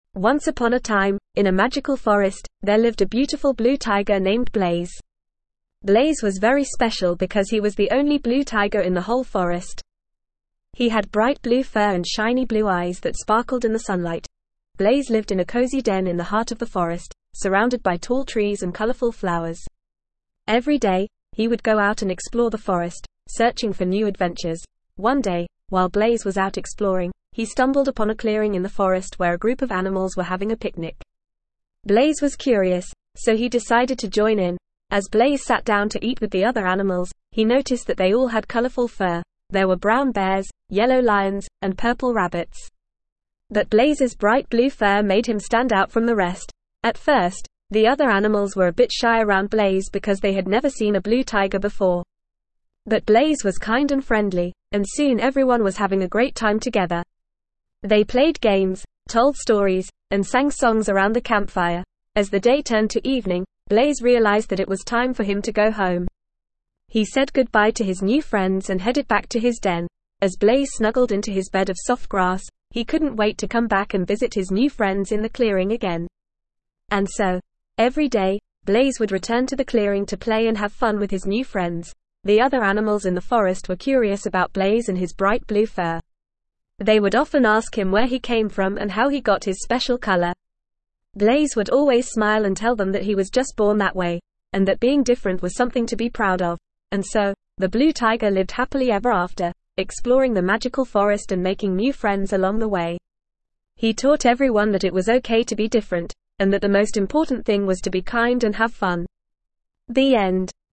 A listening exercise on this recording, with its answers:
Please answer the following questions with your teacher or partner.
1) What was special about Blaze, the blue tiger?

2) Where did Blaze live?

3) Why did Blaze go to the clearing in the forest?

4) What did Blaze do with the other animals in the clearing?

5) What color was Blaze's fur?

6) How did the other animals react when they saw Blaze for the first time?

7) What did Blaze and the other animals do around the campfire?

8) Why did Blaze go back to his den at the end of the day?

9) What did the other animals in the forest ask Blaze about?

Please fill in the gaps.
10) Blaze was the only _____ tiger in the whole forest.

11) Blaze lived in a _____ den in the heart of the forest.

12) Blaze went to the clearing in the forest because he was _____ and wanted to join in on the picnic.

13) Blaze and the other animals _____ games, told stories, and sang songs around the campfire.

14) Blaze had bright _____ fur.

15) The other animals were a bit _____ when they saw Blaze for the first time because they had never seen a blue tiger before.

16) Blaze went back to his den at the end of the day because it was time for him to go _____.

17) The other animals in the forest asked Blaze about where he came from and how he got his bright _____ fur.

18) Blaze lived _____ ever after, exploring the magical forest and making new friends along the way.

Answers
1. Blaze was special because he was the only blue tiger in the whole forest.
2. Blaze lived in a cozy den in the heart of the forest.
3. Blaze went to the clearing in the forest because he was curious and wanted to join in on the picnic that the other animals were having.
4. Blaze played games, told stories, and sang songs with the other animals in the clearing.
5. Blaze had bright blue fur.
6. The other animals were a bit shy when they saw Blaze for the first time because they had never seen a blue tiger before.
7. Blaze and the other animals played games, told stories, and sang songs around the campfire.
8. Blaze went back to his den at the end of the day because it was time for him to go home.
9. The other animals in the forest asked Blaze about where he came from and how he got his bright blue fur.
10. blue
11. cozy
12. curious
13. played
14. blue
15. shy
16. home
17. blue
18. happily

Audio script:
Once upon a time, in a magical forest, there lived a beautiful blue tiger named Blaze. Blaze was very special because he was the only blue tiger in the whole forest. He had bright blue fur and shiny blue eyes that sparkled in the sunlight.
Blaze lived in a cozy den in the heart of the forest, surrounded by tall trees and colorful flowers. Every day, he would go out and explore the forest, searching for new adventures.
One day, while Blaze was out exploring, he stumbled upon a clearing in the forest where a group of animals were having a picnic. Blaze was curious, so he decided to join in.
As Blaze sat down to eat with the other animals, he noticed that they all had colorful fur – there were brown bears, yellow lions, and purple rabbits. But Blaze's bright blue fur made him stand out from the rest.
At first, the other animals were a bit shy around Blaze because they had never seen a blue tiger before. But Blaze was kind and friendly, and soon everyone was having a great time together. They played games, told stories, and sang songs around the campfire.
As the day turned to evening, Blaze realized that it was time for him to go home. He said goodbye to his new friends and headed back to his den.
As Blaze snuggled into his bed of soft grass, he couldn't wait to come back and visit his new friends in the clearing again. And so, every day, Blaze would return to the clearing to play and have fun with his new friends.
The other animals in the forest were curious about Blaze and his bright blue fur. They would often ask him where he came from and how he got his special color. Blaze would always smile and tell them that he was just born that way, and that being different was something to be proud of.
And so, the blue tiger lived happily ever after, exploring the magical forest and making new friends along the way. He taught everyone that it was okay to be different, and that the most important thing was to be kind and have fun. The end.

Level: Level 2